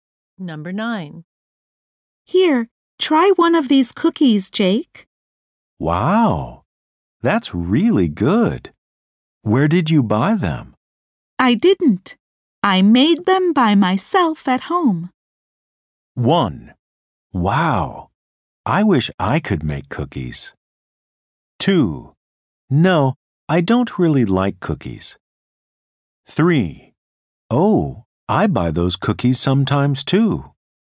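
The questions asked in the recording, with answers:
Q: I didn't. I made them by myself at home.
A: 1: Wow, I wish I could make cookies.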